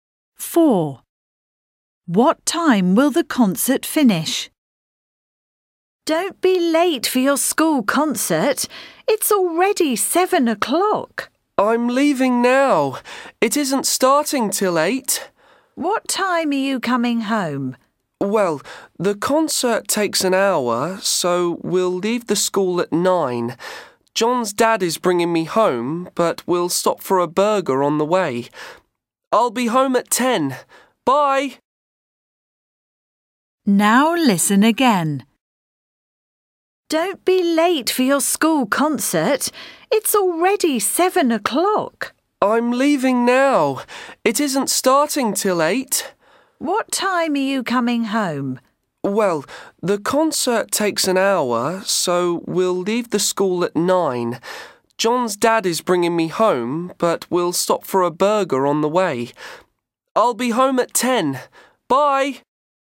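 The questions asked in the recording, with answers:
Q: What time will the concert finish?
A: 9 o'clock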